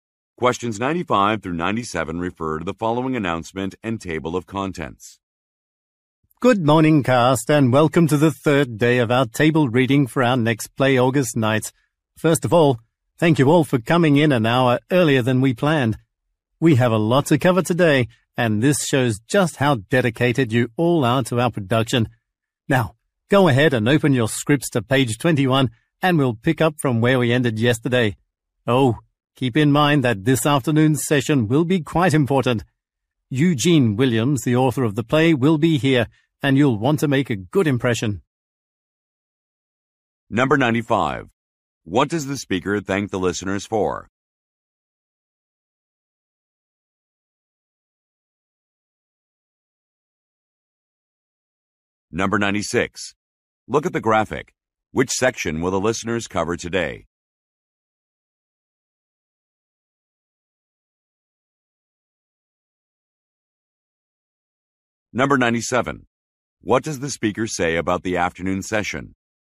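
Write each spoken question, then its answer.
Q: What does the speaker thank the listeners for?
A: Coming in an hour early

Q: What does the speaker say about the afternoon session?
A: The play's author will attend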